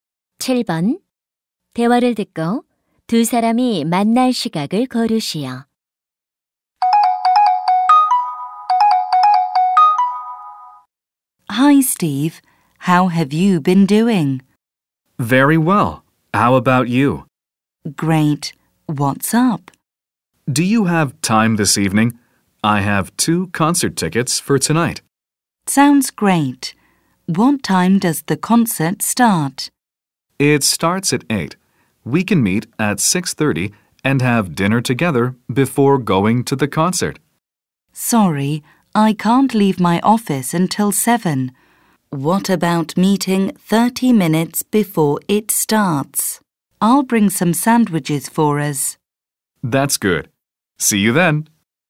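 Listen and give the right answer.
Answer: 7시 30분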